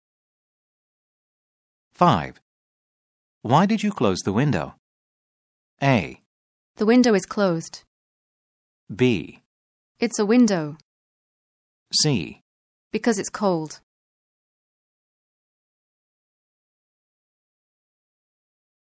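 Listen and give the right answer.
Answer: C: Because it's cold.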